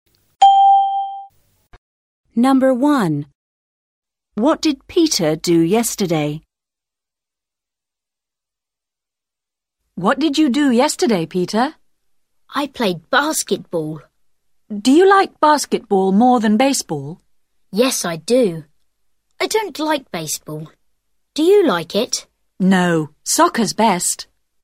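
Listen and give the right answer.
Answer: He played basketball.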